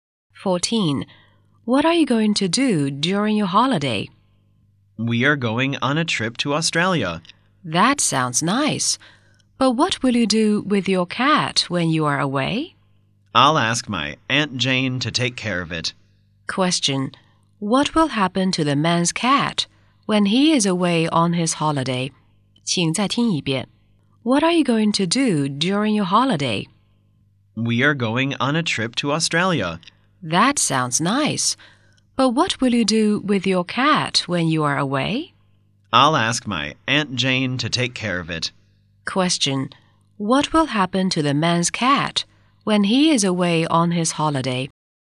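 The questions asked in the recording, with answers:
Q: What will happen to the man's cat when he is away on his holiday?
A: His Aunt Jane will take care of it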